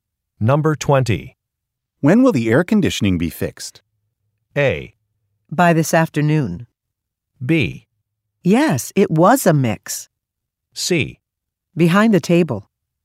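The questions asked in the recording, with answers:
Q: When will the air conditioning be fixed?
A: A: By this afternoon.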